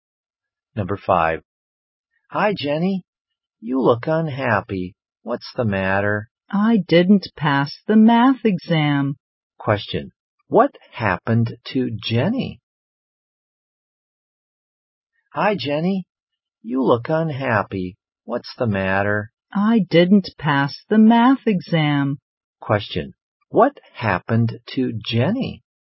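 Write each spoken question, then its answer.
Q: what happened to Jenny?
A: She didn't pass the math exam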